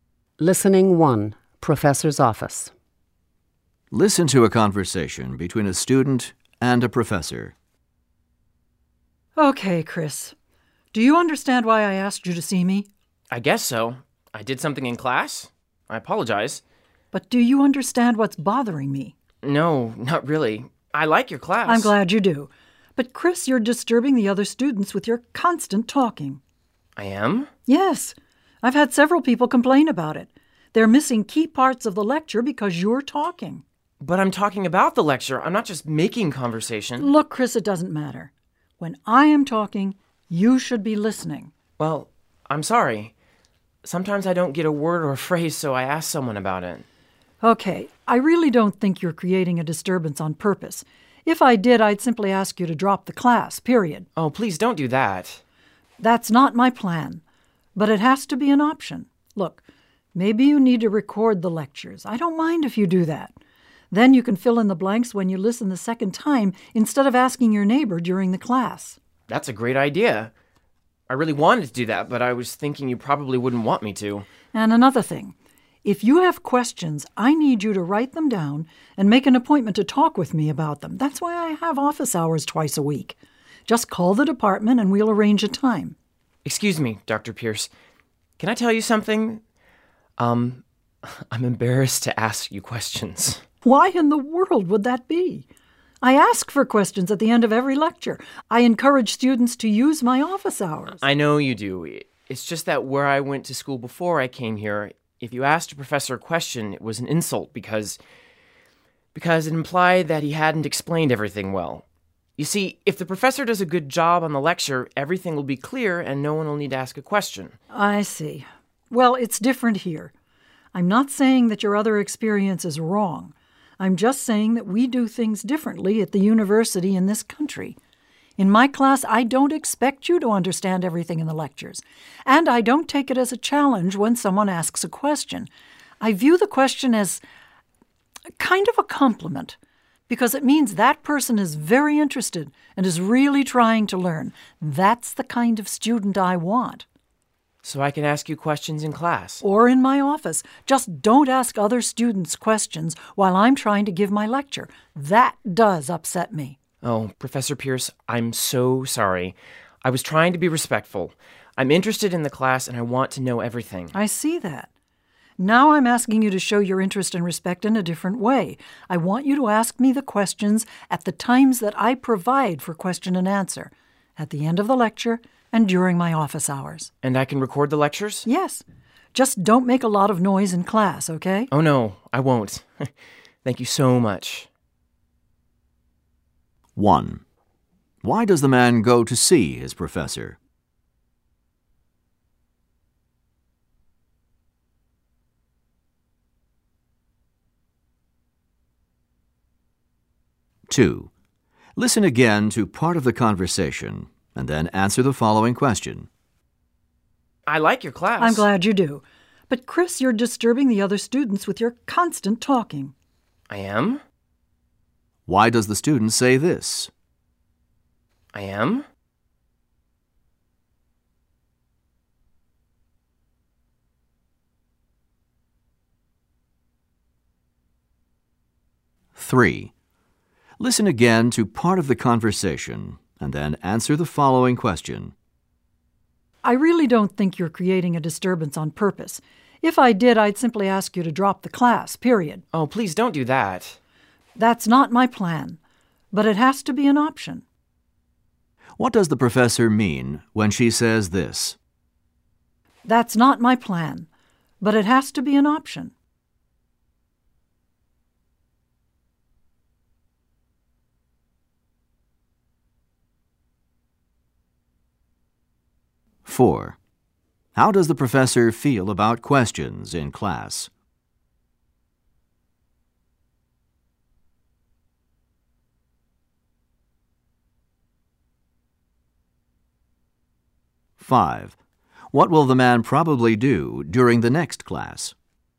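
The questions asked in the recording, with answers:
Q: Why does the man go to see his professor?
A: Because the professor asked to see him about his talking in class, which disturbs other students

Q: How does the professor feel about questions in class?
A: She welcomes them and sees them as a compliment showing interest

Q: What will the man probably do during the next class?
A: Record the lecture (and not talk to other students)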